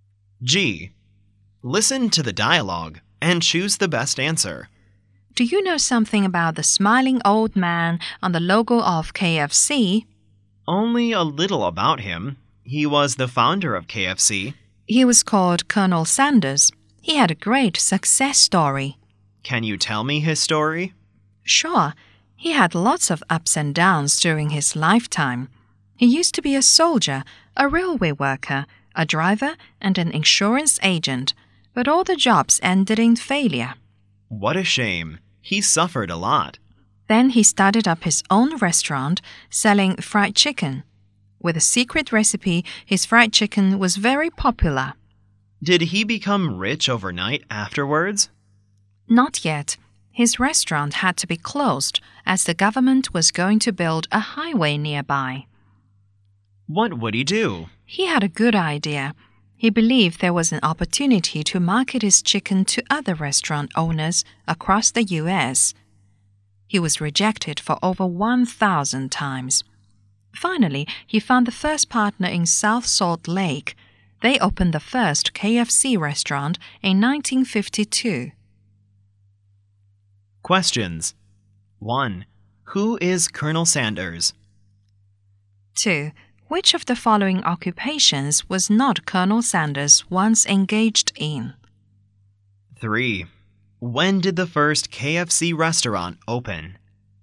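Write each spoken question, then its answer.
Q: Who is Colonel Sanders?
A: The founder of KFC

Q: When did the first KFC restaurant open?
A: In 1952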